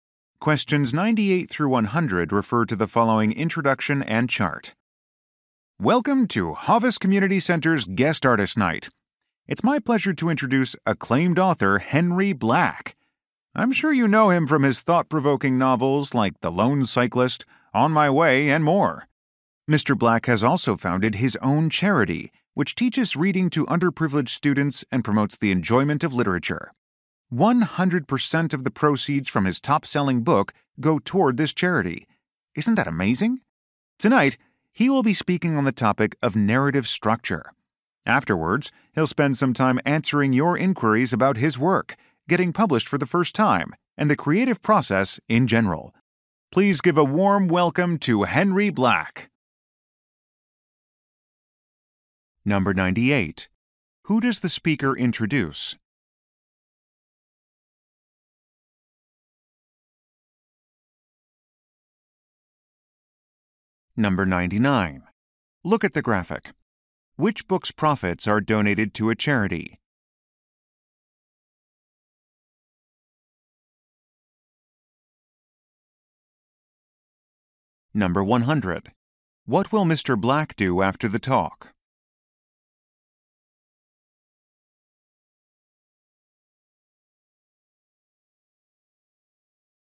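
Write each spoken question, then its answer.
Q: Who does the speaker introduce?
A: An author

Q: What will Mr. Black do after the talk?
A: Answer questions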